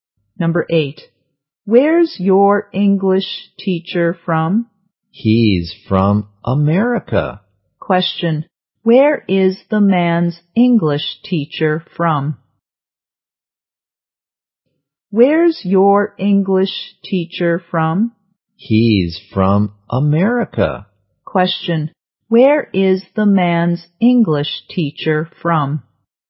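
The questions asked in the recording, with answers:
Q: where is the man's English teacher from?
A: America.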